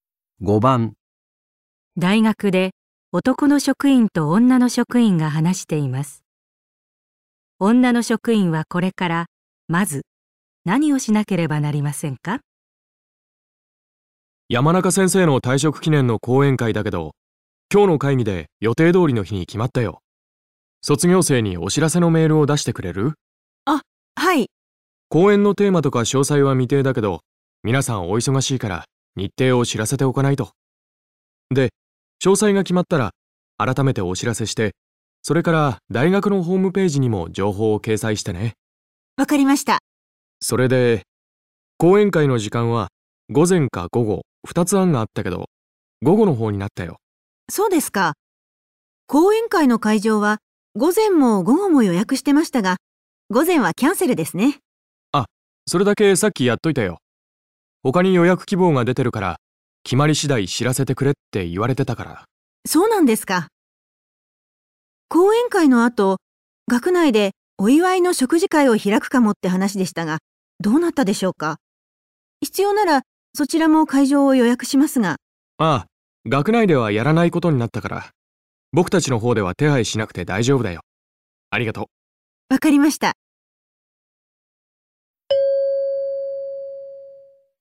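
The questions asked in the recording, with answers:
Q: 女の職員はこれからまず何をしなければなりませんか?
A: 卒業生に講演会の日程を知らせるメールを出す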